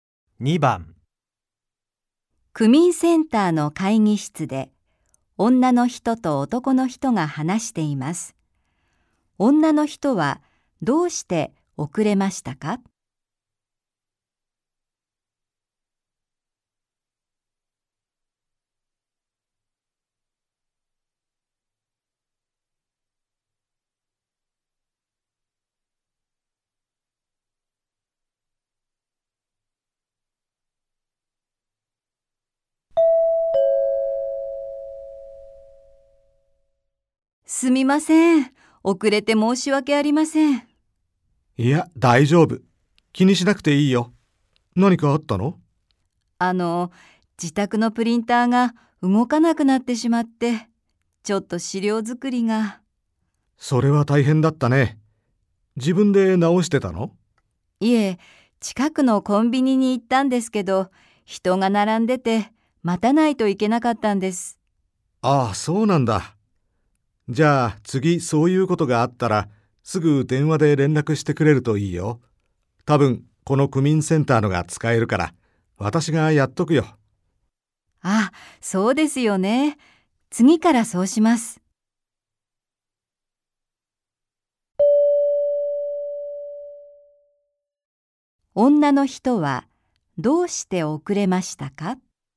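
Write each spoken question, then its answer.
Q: 女の人はどうして遅れましたか?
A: プリンターが壊れ、コンビニで資料を印刷するのに並んで待ったから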